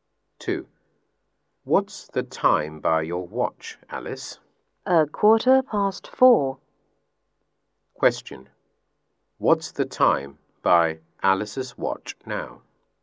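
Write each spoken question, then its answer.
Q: What's the time by Alice's watch now?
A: 4:15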